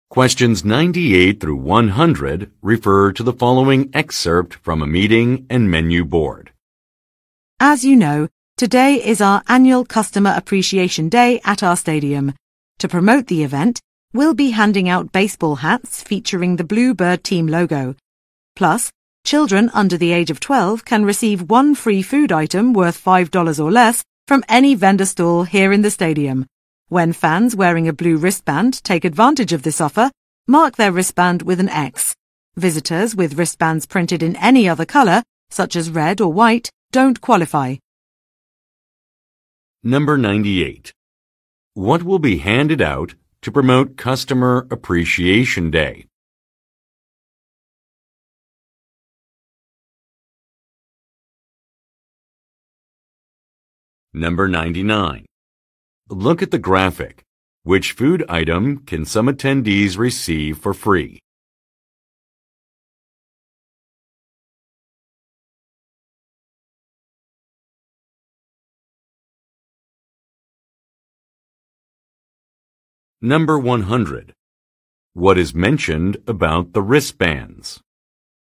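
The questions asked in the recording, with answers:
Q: What will be handed out to promote Customer Appreciation Day?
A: Baseball hats with the Bluebird team logo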